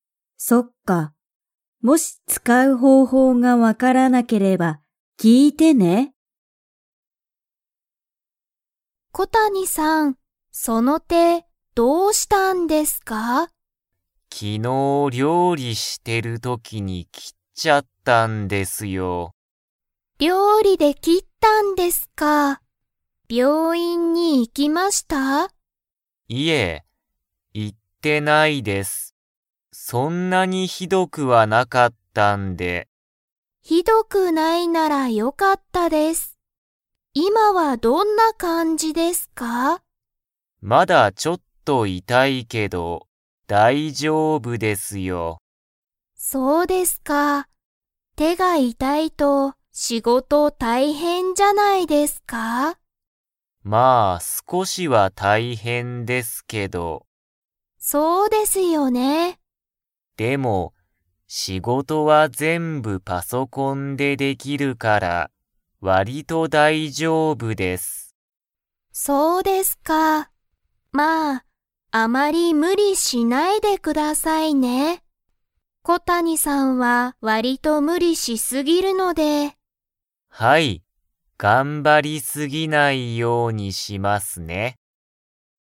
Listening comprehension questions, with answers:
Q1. 小谷こたにさんは病院びょういんに 。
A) 行いった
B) 行いってない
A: 行いってない

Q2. 小谷こたにさんは、仕事しごとを全部ぜんぶ、何なにでしてますか?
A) 手て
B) パソコン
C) 料理りょうり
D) 病院びょういん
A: パソコン

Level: Level 3

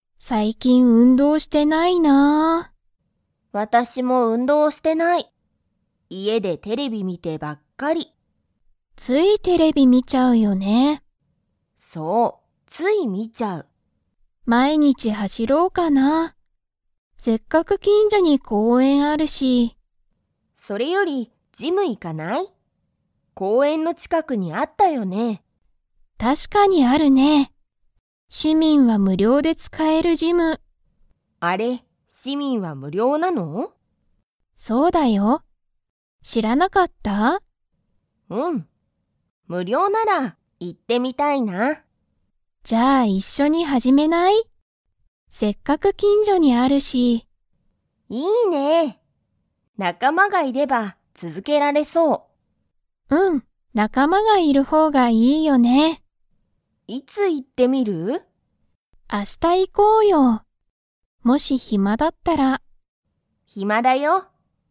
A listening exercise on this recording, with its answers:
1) ミキとアリサは、最近さいきん運動うんどう 。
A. してる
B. してない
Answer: してない

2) どんな人ひとが、ジムを無料むりょうで使つかえますか?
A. 市民しみん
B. 日本人にほんじん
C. 外国人がいこくじん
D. 暇ひまな人ひと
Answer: 市民しみん

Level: Level 4

